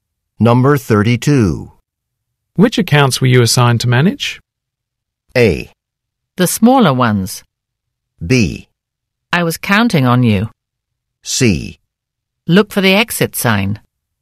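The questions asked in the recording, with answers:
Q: Which accounts were you assigned to manage?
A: A: The smaller ones.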